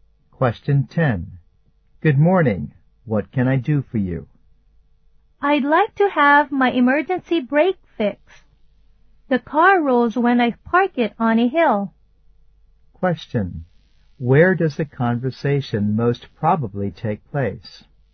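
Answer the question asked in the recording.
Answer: At a garage (car repair shop).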